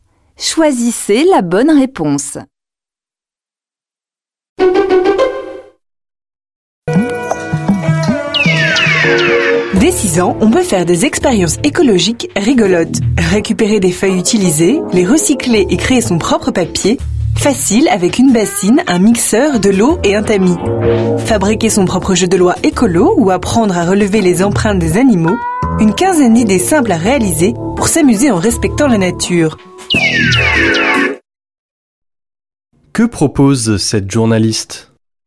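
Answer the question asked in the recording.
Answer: Des expériences écologiques amusantes pour les enfants (dès 6 ans)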